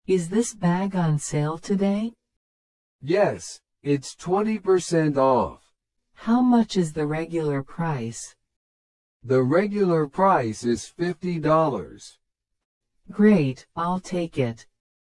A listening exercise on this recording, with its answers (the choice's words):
How much is the bag on sale?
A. $50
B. $40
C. $80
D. $70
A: $40

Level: 初級者用